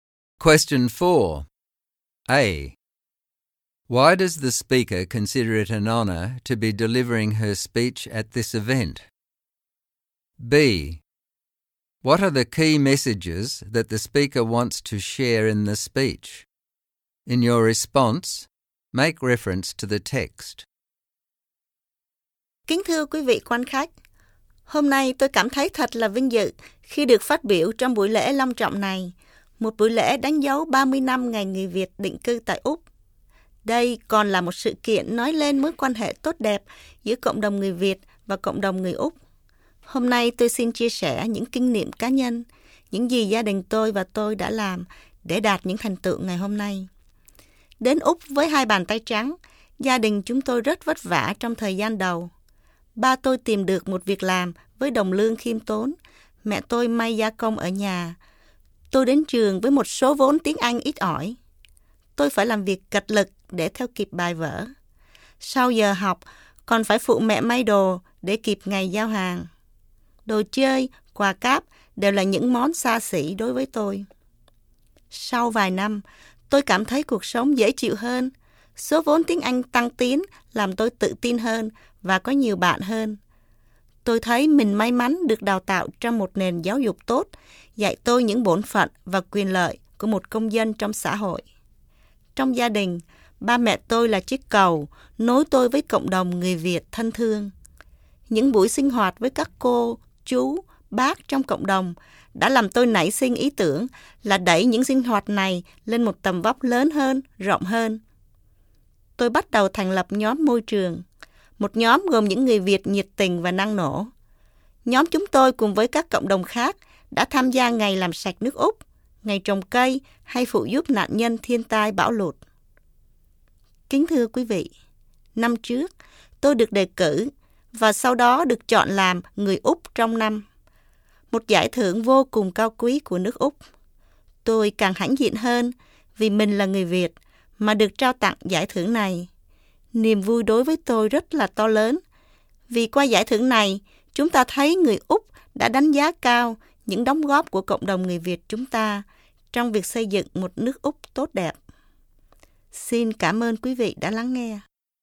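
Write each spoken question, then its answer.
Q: Why does the speaker consider it an honour to be delivering her speech at this event?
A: It is a formal ceremony marking 30 years of Vietnamese settlement in Australia, and it shows the good relationship between the Vietnamese and Australian communities

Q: What are the key messages that the speaker wants to share in the speech?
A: Through hard work and a good education, her family overcame early hardship. She connected with the Vietnamese community, set up an environmental group to serve the wider society, and her Australian of the Year award shows that Australia values the Vietnamese community's contributions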